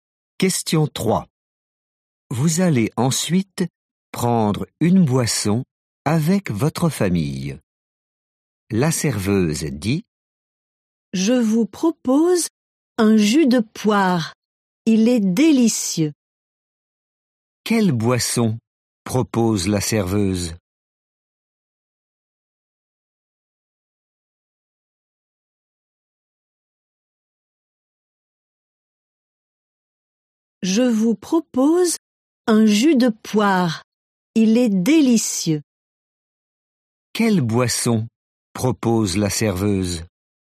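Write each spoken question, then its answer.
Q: Quelle boisson propose la serveuse?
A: un jus de poire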